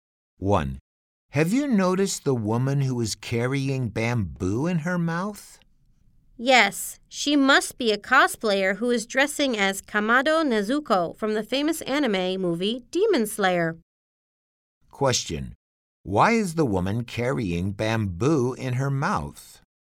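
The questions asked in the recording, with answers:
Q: Why is the woman carrying bamboo in her mouth?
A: She is a cosplayer dressing as Kamado Nezuko from Demon Slayer.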